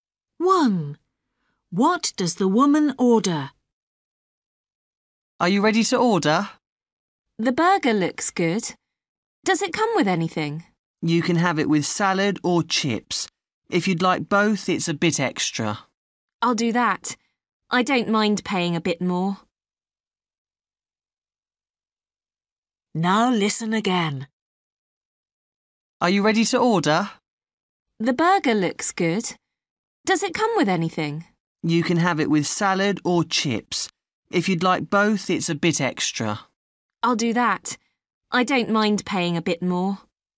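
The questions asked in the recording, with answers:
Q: What does the woman order?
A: A burger with salad and chips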